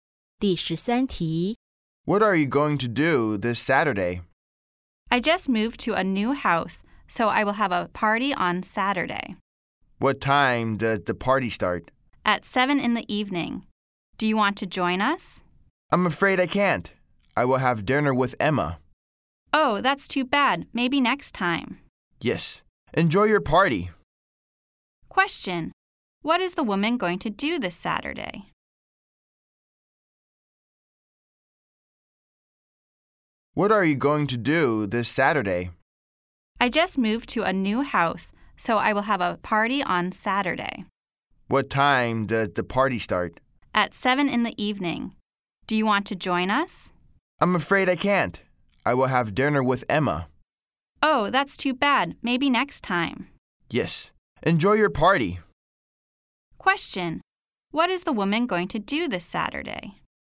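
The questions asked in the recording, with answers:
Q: What is the woman going to do this Saturday?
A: Have dinner with Emma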